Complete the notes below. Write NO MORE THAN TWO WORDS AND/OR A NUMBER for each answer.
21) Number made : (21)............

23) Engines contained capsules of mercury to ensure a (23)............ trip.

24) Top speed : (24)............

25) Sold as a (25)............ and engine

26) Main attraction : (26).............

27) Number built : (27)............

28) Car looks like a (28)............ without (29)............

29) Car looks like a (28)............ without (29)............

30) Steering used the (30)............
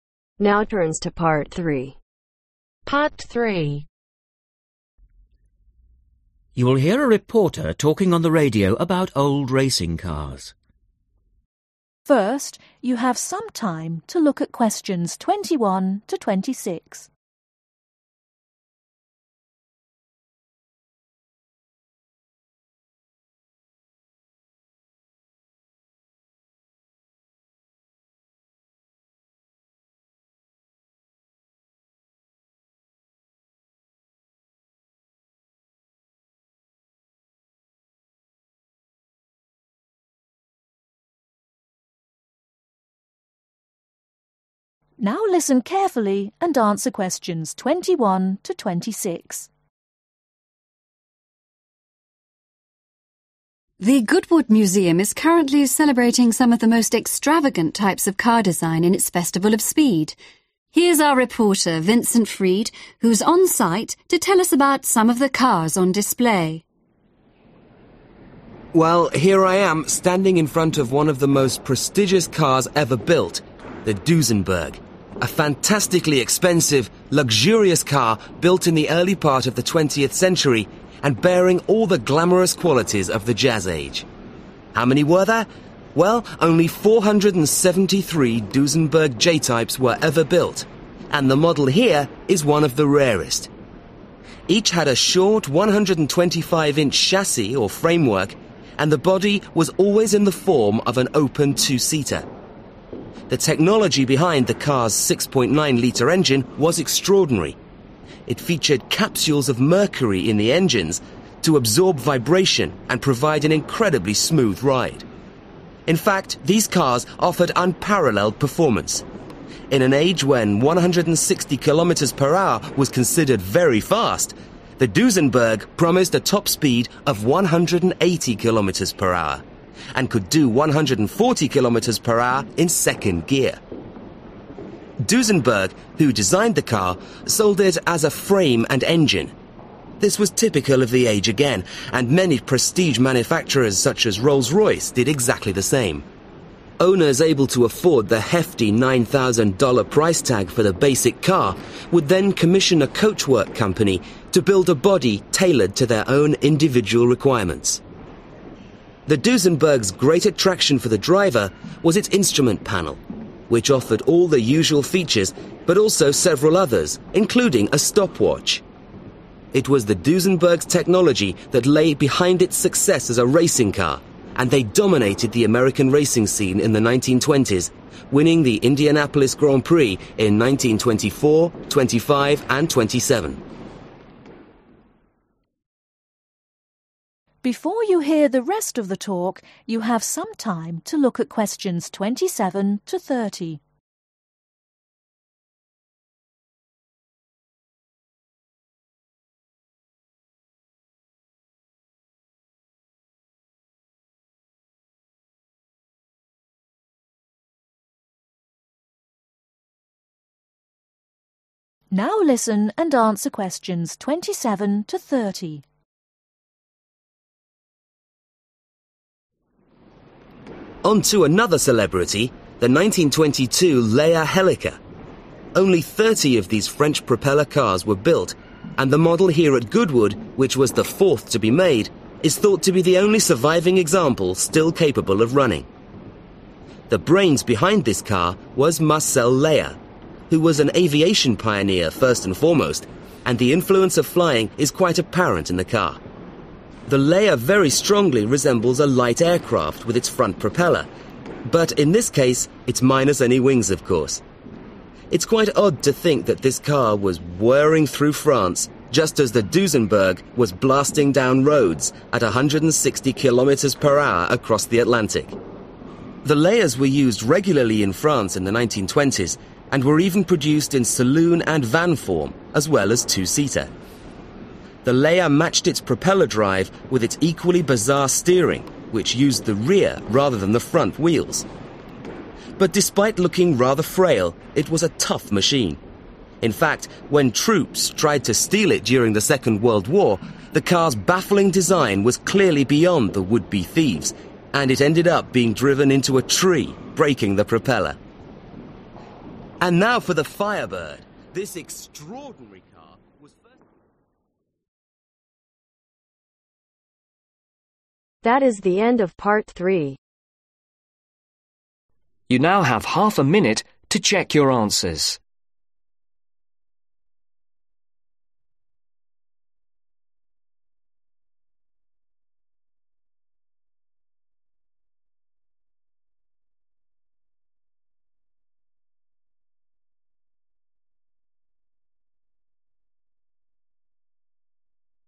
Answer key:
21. 473
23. Smooth
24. 180 Kilometers
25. Frame
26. Instrument Panel
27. 30
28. Light Aircraft
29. Wings
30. Rear Wheels